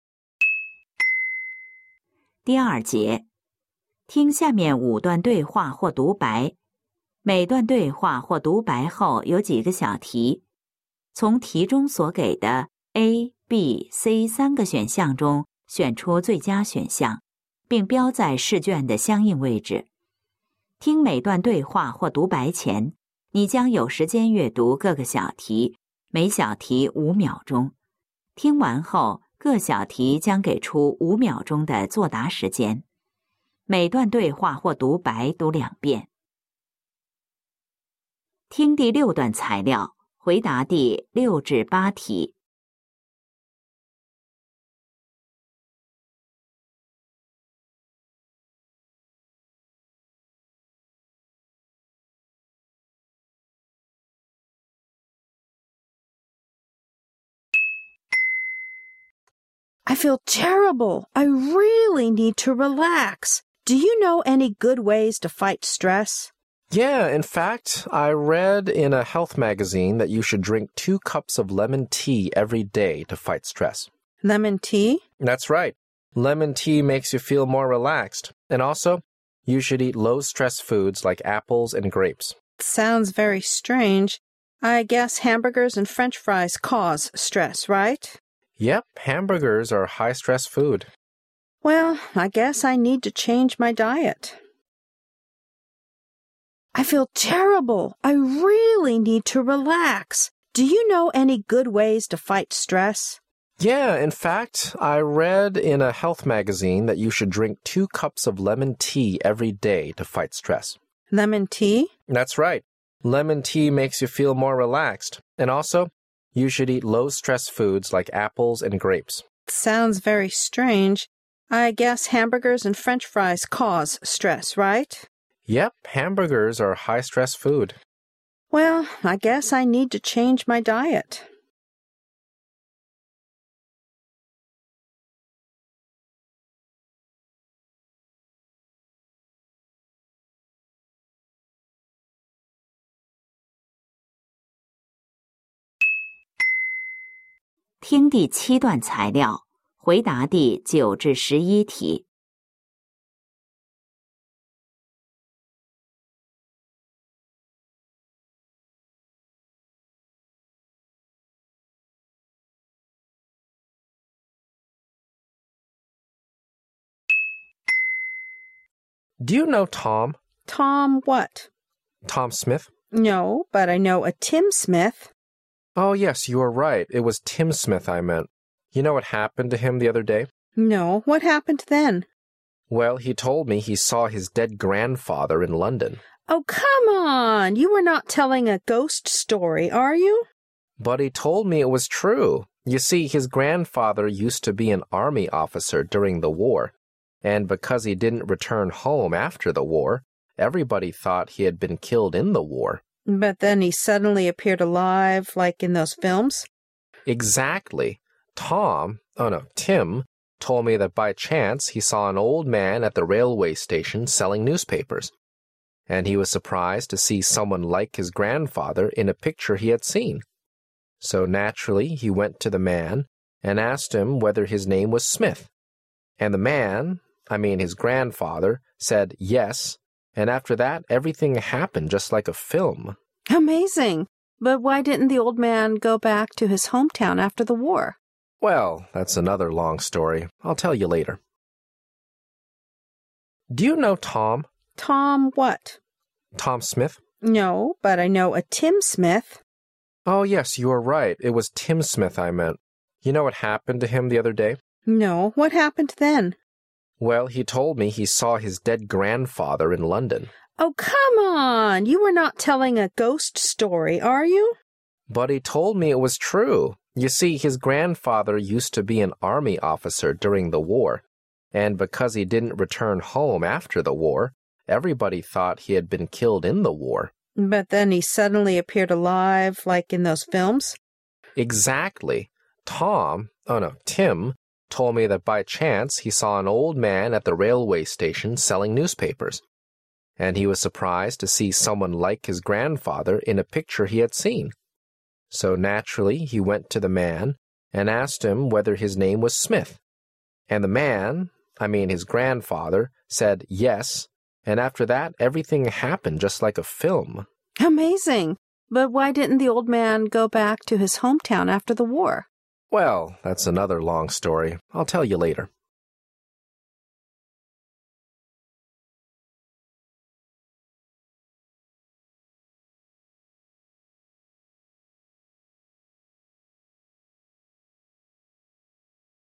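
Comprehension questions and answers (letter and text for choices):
听下面5段对话或独白。每段对话或独白后有几个小题,从题中所给的A、B、C三个选项中选出最佳选项,并标在试卷的相应位置。听每段对话或独白前,你将有时间阅读各个小题,每小题5秒钟;听完后,各小题将给出5秒钟的作答时间。每段对话或独白读两遍。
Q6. What is the woman's real problem?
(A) She feels headache.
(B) She feels frightened.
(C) She feels very stressed.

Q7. What food is considered as low stress food?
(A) Apples and grapes.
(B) Hamburgers.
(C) French fries.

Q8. What is the woman going to do?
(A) To eat less.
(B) To eat more.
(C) To change her food.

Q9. What are the man and the woman talking about?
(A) A film.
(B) A real story.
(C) A ghost story.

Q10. What's the first name of the man they are talking about?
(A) Tim.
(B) Tom.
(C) Smith.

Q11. Why didn't the man return home after the war?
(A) He had been wounded in the war.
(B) The man hasn't told the woman yet.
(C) He had to sell newspapers at the railway station.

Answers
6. (C) She feels very stressed.
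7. (A) Apples and grapes.
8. (C) To change her food.
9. (B) A real story.
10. (A) Tim.
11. (B) The man hasn't told the woman yet.

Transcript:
W: I feel terrible.I really need to relax.Do you know any good ways to fight stress?
M:Yeah,in fact,I read in a health magazine that you should drink two cups of lemon tea every day to fight stress.
W:Lemon tea?
M:That's right.Lemon tea makes you feel more relaxed.And also,you should eat low stress foods like apples and grapes.
W:Sounds very strange,I guess hamburgers and French fries cause stress,right?
M:Yep.Hamburgers are high stress food.
W:Well,I guess I need to change my diet.
W :Do you know Tom?
W:Tom what?
M:Tom Smith.
W:No.But I know a Tim Smith.
M:Oh,yes,you are right.It was Tim Smith I meant.You know what happened to him the other day?
No,what happened then?
M:Well,he told me he saw his dead grandfather in London.
W:Oh,come on.You are not telling a ghost story,are you?
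M:But he told me it was true.You see,his grandfather used to be an army officer during the war.And because he didn't return home after the war,everybody though t he had been killed in the war.
W:But then,he suddenly appeared alive,like in those films.
M:Exactly.Tom,oh no,Tim,told me that by chance he saw an old man at the railway station selling newspapers.And he was surprised to see someone like his grandfather in a picture he had seen.So naturally he went to the man and asked him whether his name was Smith.And the man,I mean,his grandfather,said yes,and after that everything happened just like a film.
W:Amazing.But why didn't the old man go back to his hometown after the war?
M:Well,that's another long story.I'll tell you later.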